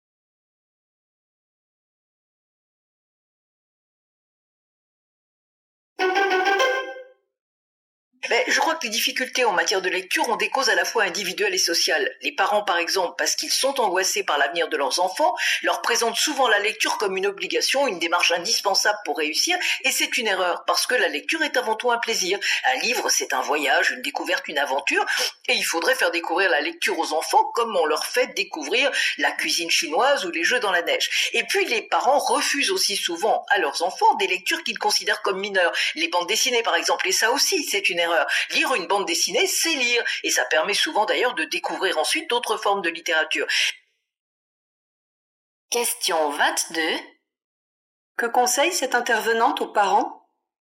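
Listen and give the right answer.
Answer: Présenter la lecture comme un plaisir et accepter les bandes dessinées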